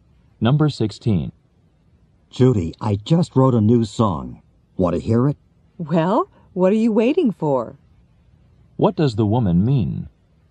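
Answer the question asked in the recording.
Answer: She wants to hear the song right away.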